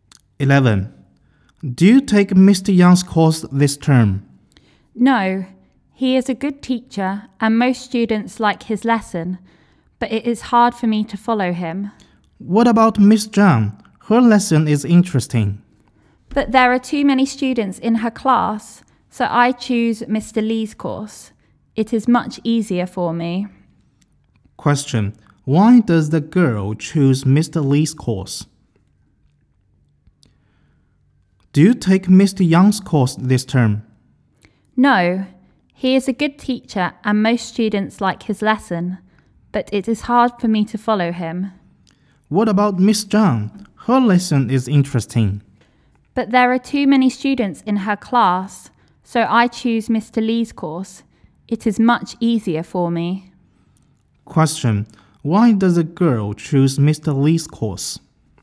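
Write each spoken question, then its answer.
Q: why does the girl choose Mr.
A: Because it is much easier for her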